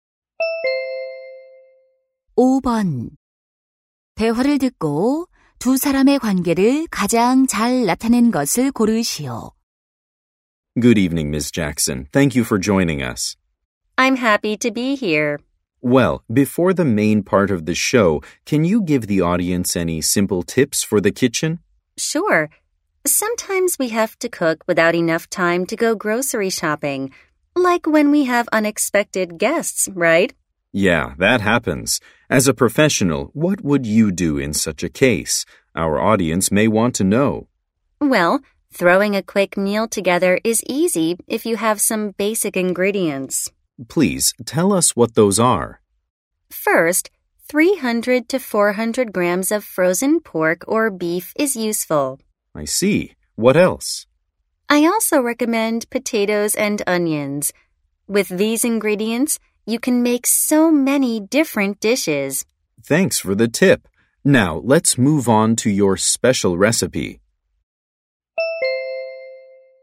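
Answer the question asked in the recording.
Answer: 방송 진행자 - 요리 전문가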